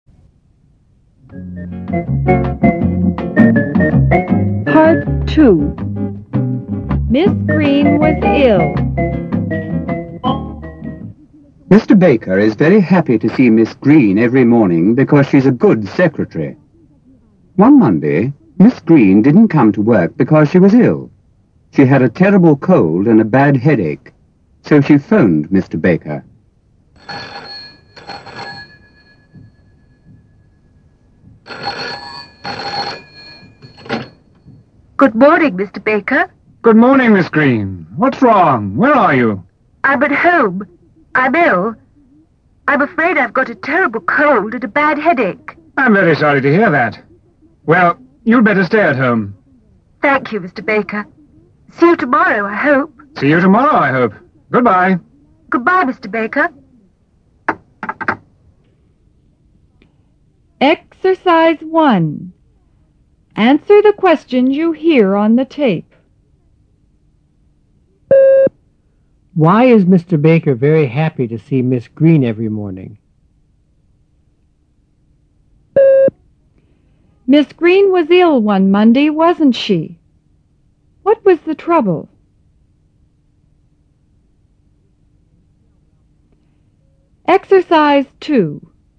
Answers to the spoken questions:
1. Because she is a good secretary.
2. Yes, she was. She had a cold and headache.

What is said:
Baker is very happy to see Miss Green every morning because she is a good secretary. One Monday Miss Green didn't come to work because she was ill. She had a terrible cold and a bad headache, so she phoned Mr. Baker.
Miss Green: Good morning, Mr. Baker.
Mr. Baker: Good morning, Miss Green. What's wrong? Where are you?
Miss Green: I am at home. I'm ill.
Mr. Baker: I'm very sorry to hear that. Well, you'd better stay at home.
Miss Green: Thank you, Mr. Baker. See you tomorrow, I hope.
Mr. Baker: See you tomorrow, I hope. Good-bye.